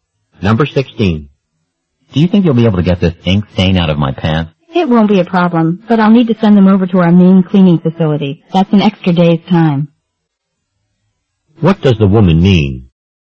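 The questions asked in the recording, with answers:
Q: What does the woman mean?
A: The stain can be removed, but it will take an extra day.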